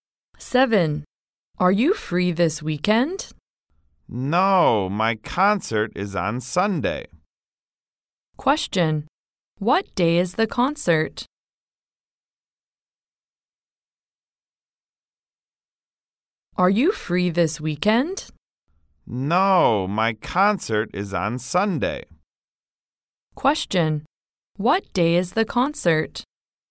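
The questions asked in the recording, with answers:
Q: What day is the concert?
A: Sunday.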